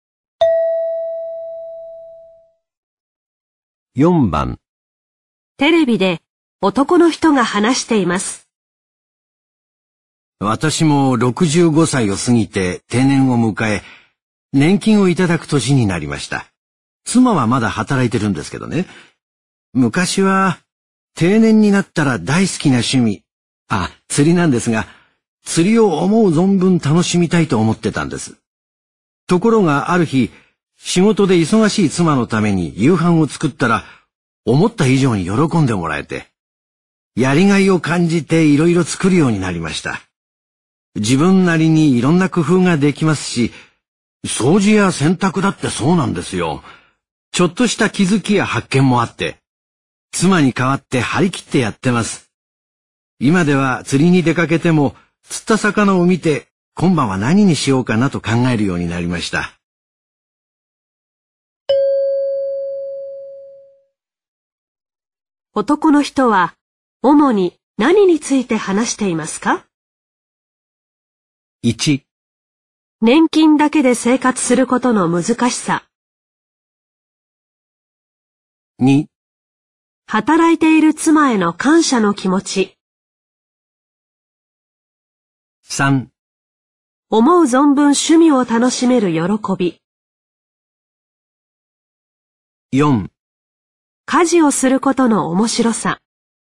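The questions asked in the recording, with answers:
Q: 男の人は主に何について話していますか?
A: 4: 家事をすることの面白さ。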